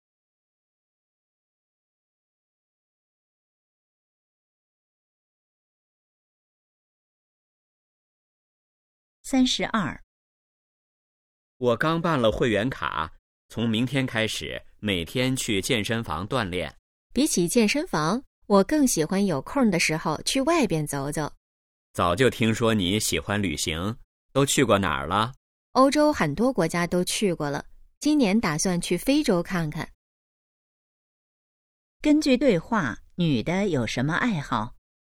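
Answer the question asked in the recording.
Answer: 旅行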